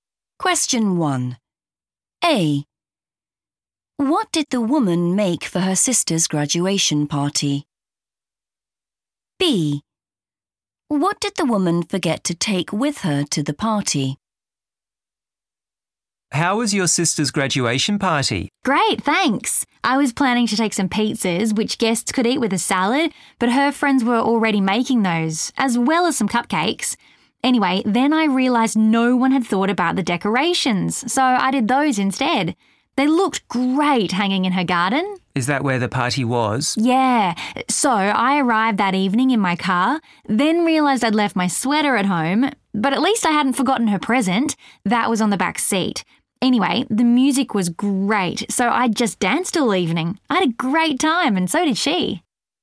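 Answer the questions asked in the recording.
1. decorations
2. her sweater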